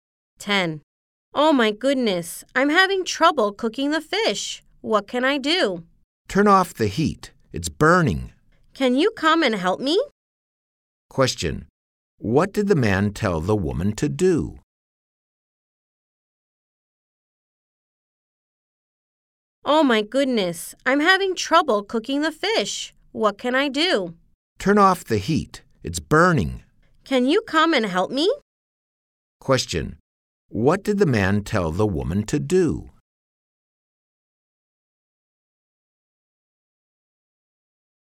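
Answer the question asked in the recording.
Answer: Turn off the heat.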